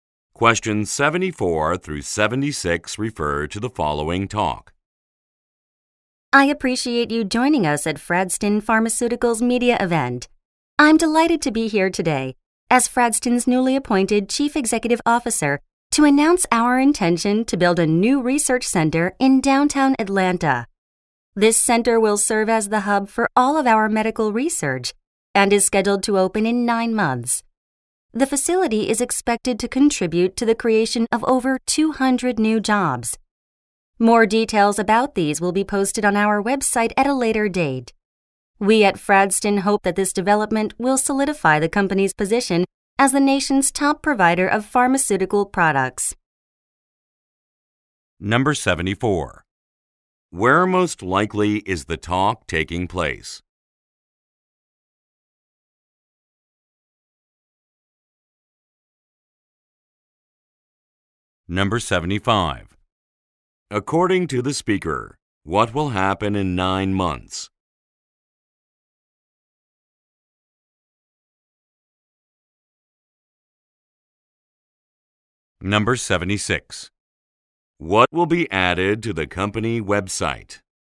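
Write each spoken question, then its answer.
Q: Where most likely is the talk taking place?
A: At a media event

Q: According to the speaker, what will happen in 9 months?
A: A new research center will open

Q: What will be added to the company website?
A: Details about the new jobs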